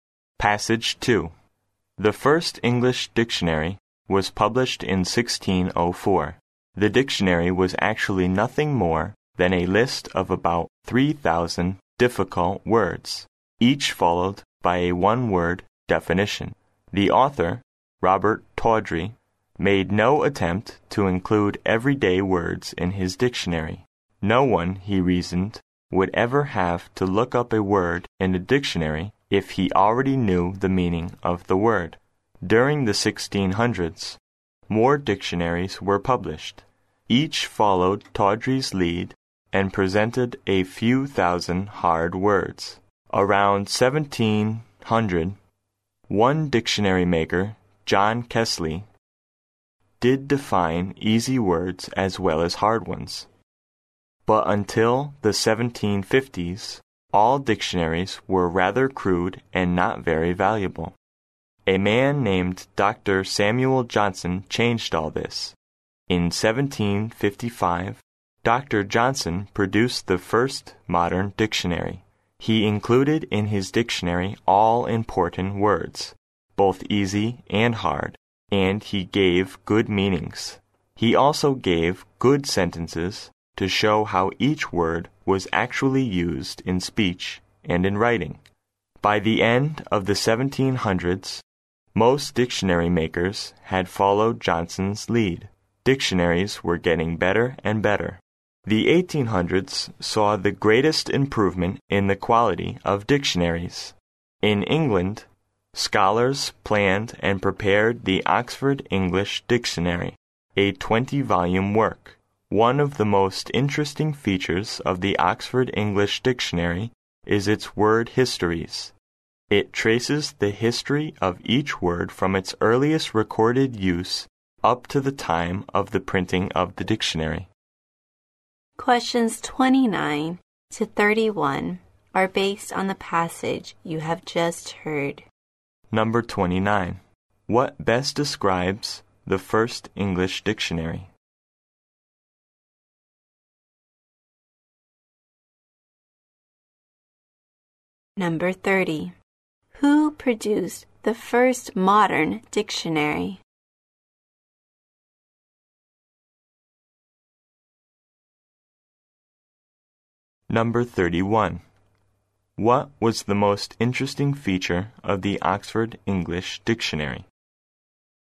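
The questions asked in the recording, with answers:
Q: What best describes the first English dictionary?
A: A list of about 3,000 difficult words with one-word definitions

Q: Who produced the first modern dictionary?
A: Dr. Samuel Johnson

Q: What was the most interesting feature of the Oxford English Dictionary?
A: Its word histories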